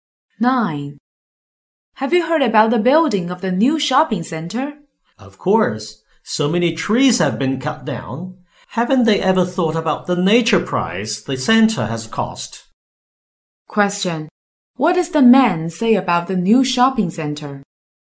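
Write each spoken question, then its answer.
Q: What does the man say about the new shopping center?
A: It was built at the cost of the environment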